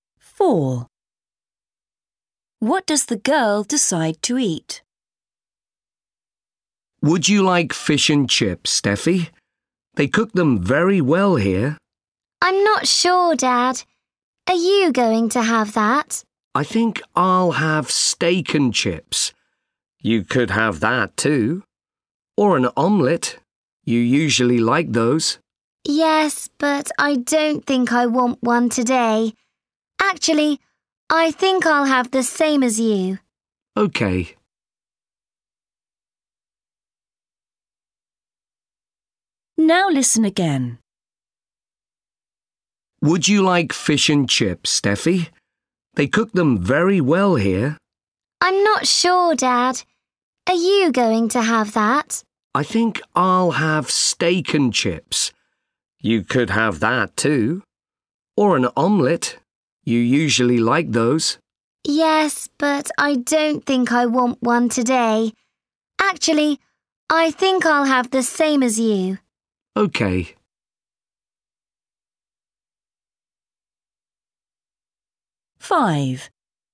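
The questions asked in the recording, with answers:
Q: What does the girl decide to eat?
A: steak and chips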